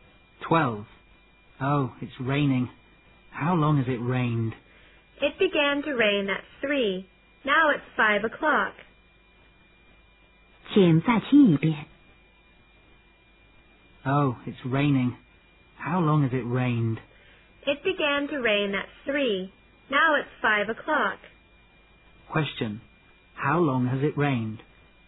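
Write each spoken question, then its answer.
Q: How long has it rained?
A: For two hours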